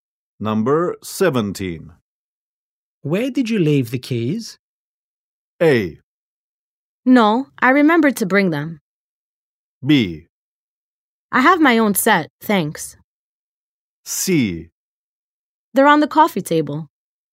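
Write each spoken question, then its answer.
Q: Where did you leave the keys?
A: C: They're on the coffee table.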